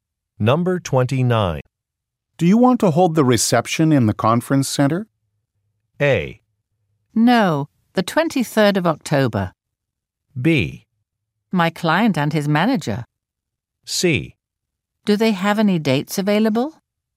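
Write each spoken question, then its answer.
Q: Do you want to hold the reception in the conference center?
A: C: Do they have any dates available?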